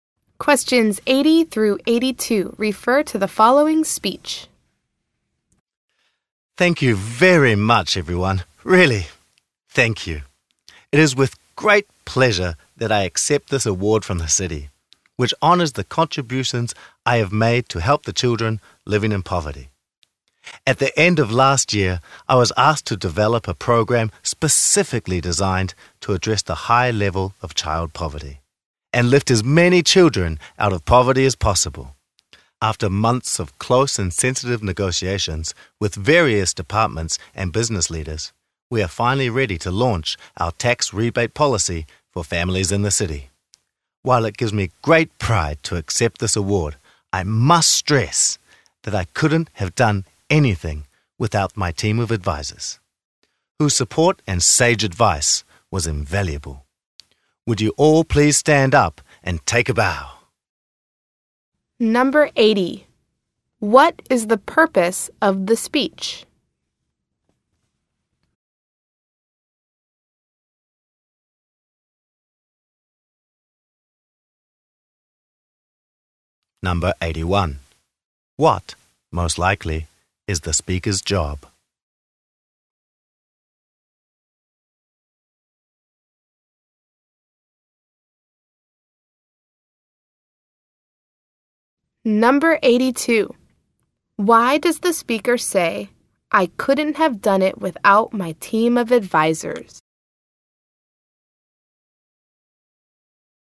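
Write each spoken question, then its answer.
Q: What is the purpose of the speech?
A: To accept an award

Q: Why does the speaker say, "I couldn't have done it without my team of advisors"?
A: To credit and thank her advisors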